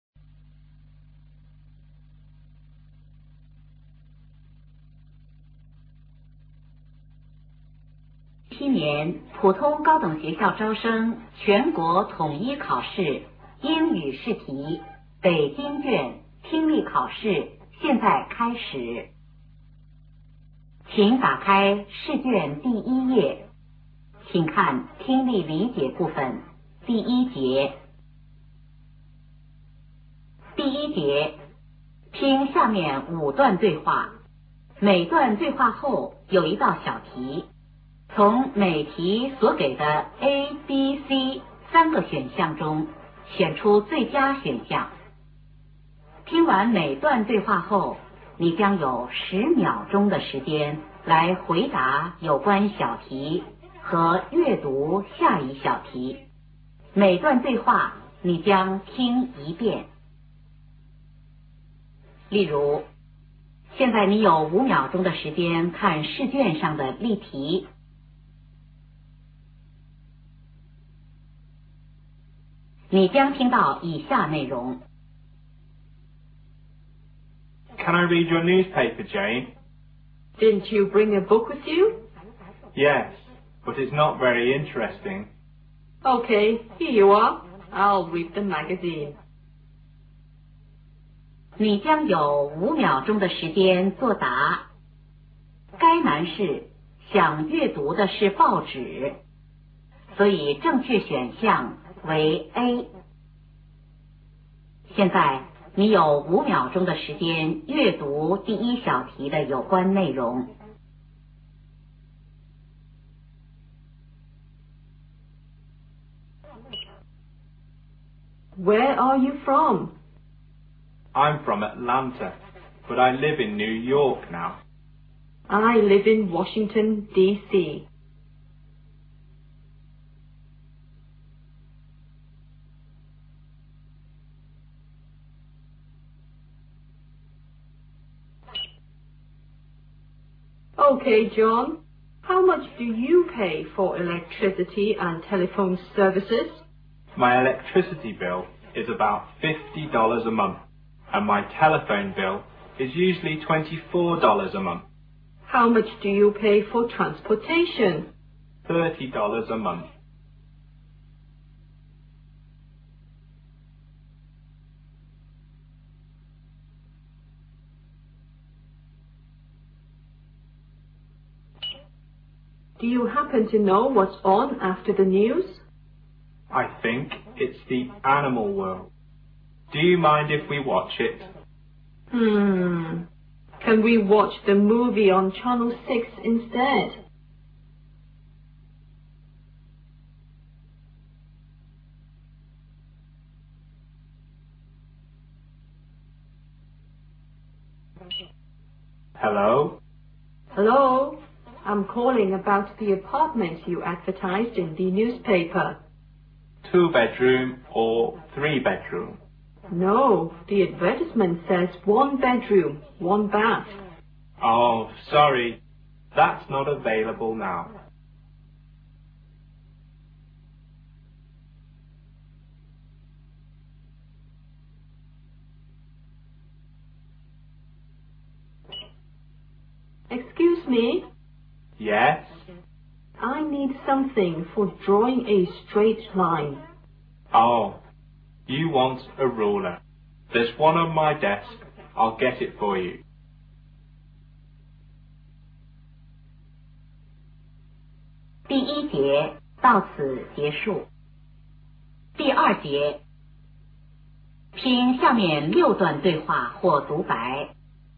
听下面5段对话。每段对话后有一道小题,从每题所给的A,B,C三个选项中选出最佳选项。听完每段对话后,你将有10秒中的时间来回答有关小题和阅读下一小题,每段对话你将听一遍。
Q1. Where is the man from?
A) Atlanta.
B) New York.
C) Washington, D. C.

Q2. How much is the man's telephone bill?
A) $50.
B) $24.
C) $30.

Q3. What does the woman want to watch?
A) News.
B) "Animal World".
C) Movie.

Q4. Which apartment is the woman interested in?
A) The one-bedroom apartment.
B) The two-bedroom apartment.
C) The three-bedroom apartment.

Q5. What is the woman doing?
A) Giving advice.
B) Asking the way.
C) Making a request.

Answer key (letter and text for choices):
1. A) Atlanta.
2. B) $24.
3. C) Movie.
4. A) The one-bedroom apartment.
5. C) Making a request.